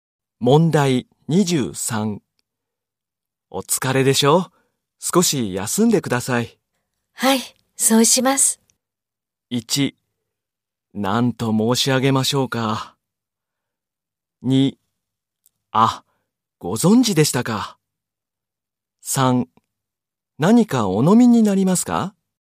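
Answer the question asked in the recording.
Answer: 3: 何かお飲みになりますか?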